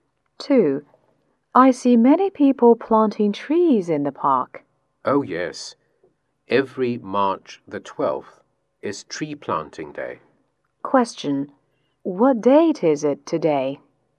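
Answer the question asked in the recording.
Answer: March 12th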